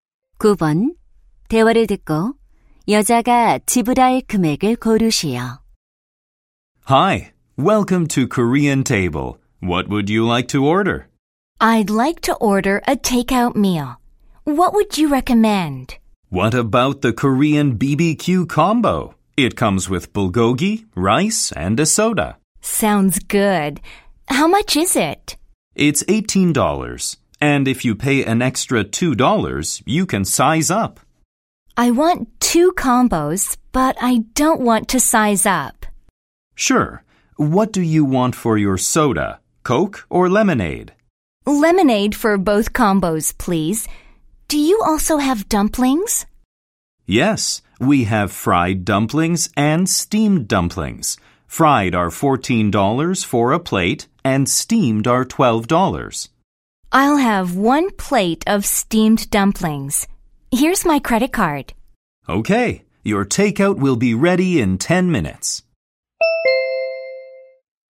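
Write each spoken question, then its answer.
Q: 대화를 듣고 여자가 지불할 금액을 고르시오.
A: $48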